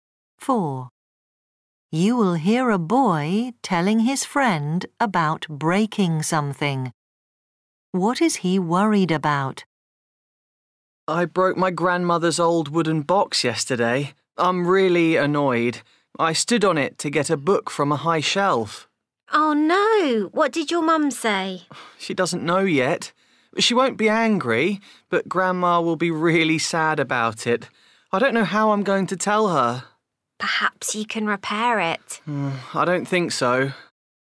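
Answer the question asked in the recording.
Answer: His grandmother will be sad about the broken box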